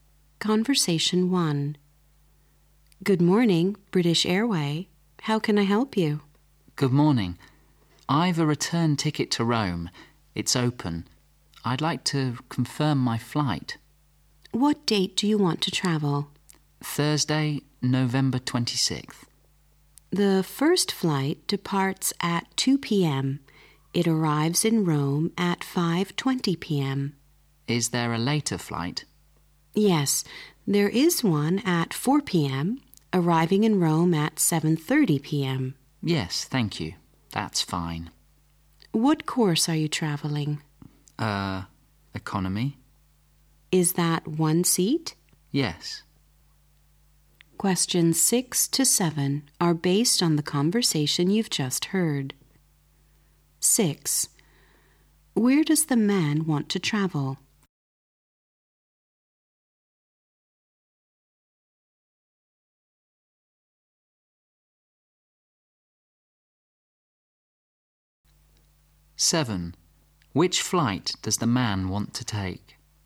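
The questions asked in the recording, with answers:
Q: Where does the man want to travel?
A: Rome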